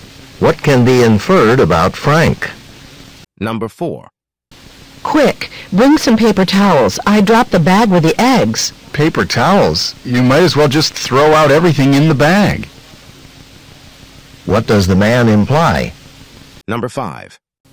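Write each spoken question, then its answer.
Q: What does the man imply?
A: Everything in the bag is probably ruined.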